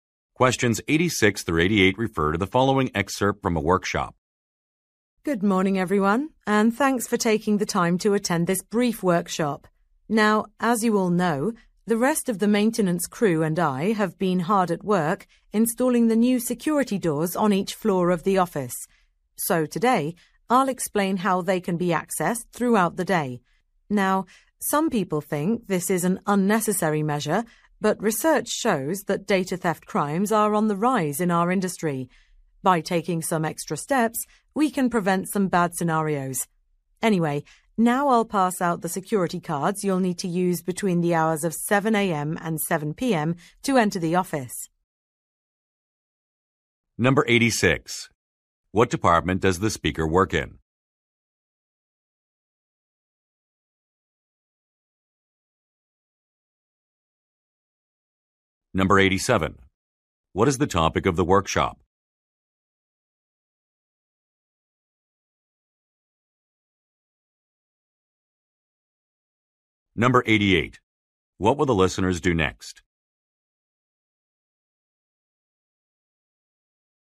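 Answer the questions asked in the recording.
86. Maintenance
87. How to access the new security doors
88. Receive security cards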